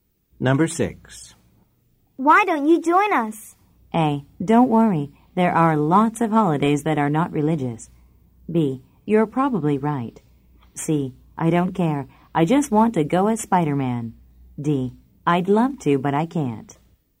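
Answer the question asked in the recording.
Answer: D: I'd love to, but I can't.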